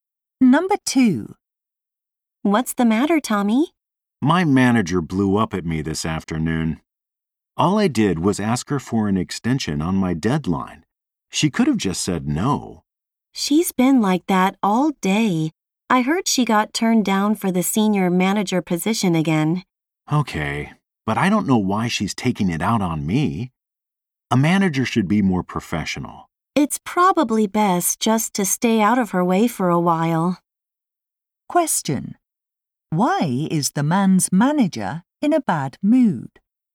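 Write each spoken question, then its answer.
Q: Why is the man's manager in a bad mood?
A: She was turned down for the senior manager job again.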